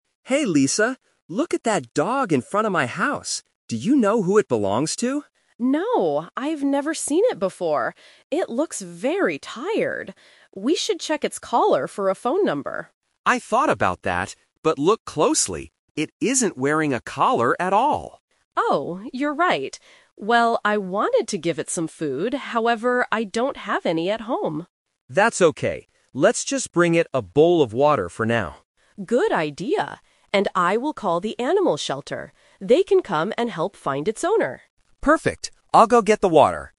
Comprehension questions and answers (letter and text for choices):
Listen to the conversation between two neighbors and choose the correct answer (A, B, or C).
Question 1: What did Lisa want to do first to help the dog?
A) Call the animal shelter.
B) Check its collar for a phone number.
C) Give it a bowl of water.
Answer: B) Check its collar for a phone number.

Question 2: Why can't Lisa give the dog any food?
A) Because she doesn't have any food at home.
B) Because the dog is not hungry.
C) Because Tom says it is dangerous.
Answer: A) Because she doesn't have any food at home.

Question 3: What are they going to do at the end?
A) Give the dog some food and take it inside.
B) Look for a phone number on the dog's collar.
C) Give the dog water and call the shelter.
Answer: C) Give the dog water and call the shelter.

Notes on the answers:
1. Lisa says at the beginning, "We should check its collar for a phone number." Option (A) is the trap; calling the shelter is what she decides to do at the end, not first. Option (C) is Tom's idea later in the conversation.
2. Lisa says, "I wanted to give it some food, however, I don't have any at home." Option (B) and (C) might be plausible reasons in real life, but they are not mentioned in the audio.
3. Tom says, "Let's just bring it a bowl of water," and Lisa adds, "And I will call the animal shelter." Option (B) is the trap; it was their original plan, but they couldn't do it because the dog didn't have a collar (The Twist). Option (A) is incorrect because they don't have food.

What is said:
Tom: Hey, Lisa. Look at that dog in front of my house. Do you know who it belongs to?
Lisa: No, I've never seen it before. It looks very tired. We should check its collar for a phone number.
Tom: I thought about that, but look closely, it isn't wearing a collar at all.
Lisa: Oh, you're right. Well, I wanted to give it some food, however, I don't have any at home.
Tom: That's okay. Let's just bring it a bowl of water for now.
Lisa: Good idea. And I will call the animal shelter. They can come and help find its owner.